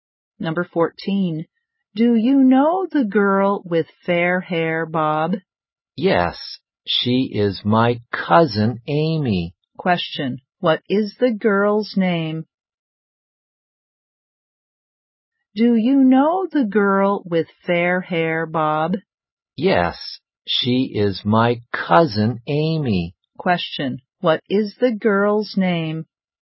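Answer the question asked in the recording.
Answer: Amy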